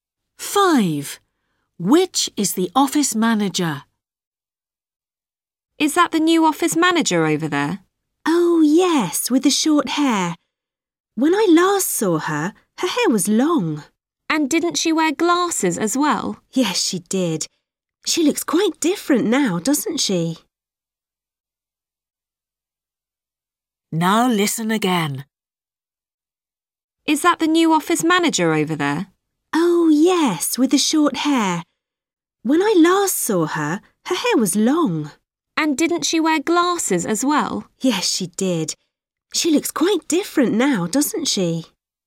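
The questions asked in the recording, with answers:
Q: Which is the office manager?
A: The woman with short hair and no glasses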